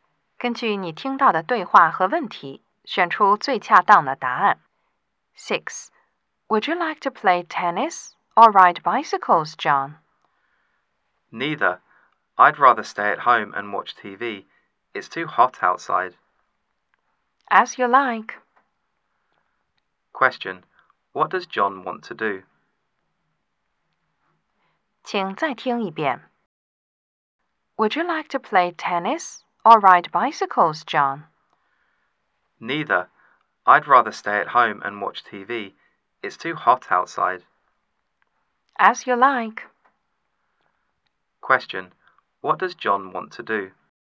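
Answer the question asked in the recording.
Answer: Stay at home and watch TV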